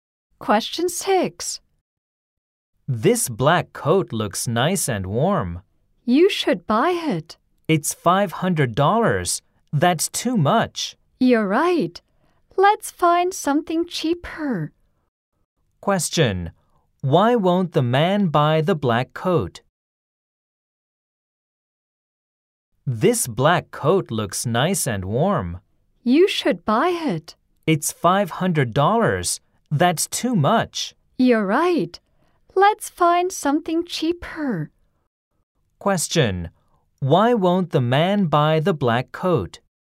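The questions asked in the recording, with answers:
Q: Why won't the man buy the black coat?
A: Because it is too expensive ($500).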